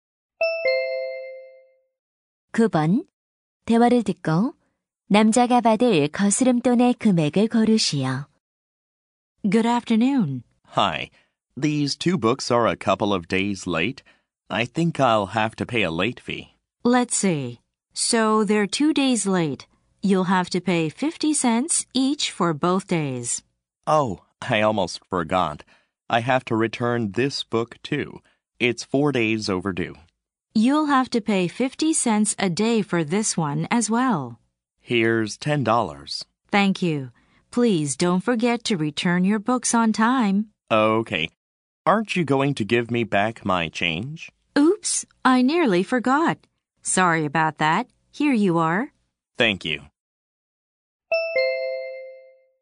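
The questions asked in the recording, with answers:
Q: 대화를 듣고 남자가 받을 거스름돈의 금액을 고르시오.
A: 6달러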